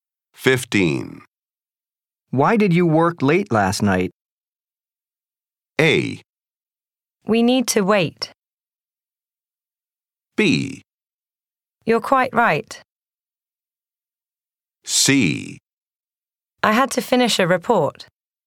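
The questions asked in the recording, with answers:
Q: Why did you work late last night?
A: C: I had to finish a report.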